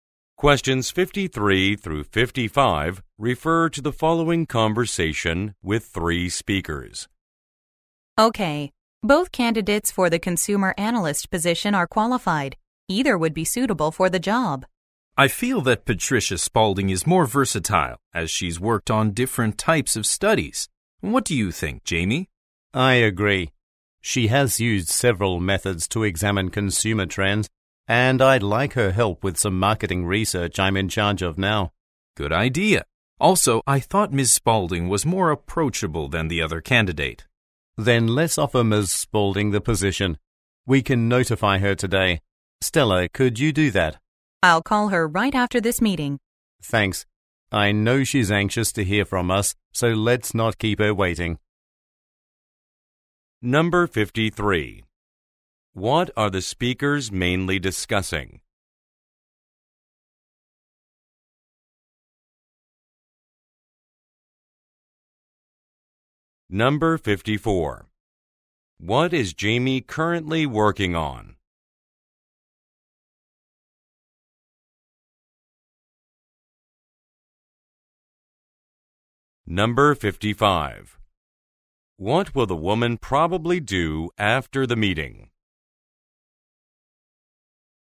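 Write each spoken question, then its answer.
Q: What are the speakers mainly discussing?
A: Which candidate to hire for the consumer analyst position

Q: What is Jamie currently working on?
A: Marketing research

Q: What will the woman probably do after the meeting?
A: Call Ms. Spaulding to offer her the position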